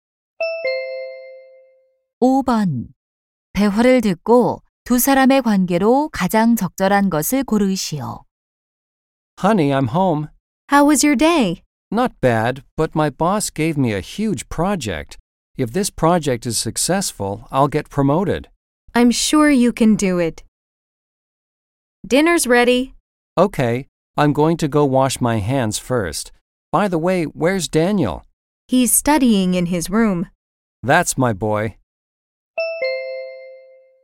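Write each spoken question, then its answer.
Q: 대화를 듣고 두 사람의 관계로 가장 적절한 것을 고르시오.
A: 부부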